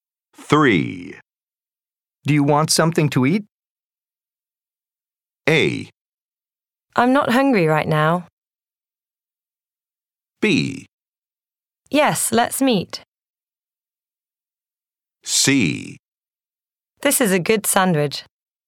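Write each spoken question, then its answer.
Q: Do you want something to eat?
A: A: I'm not hungry right now.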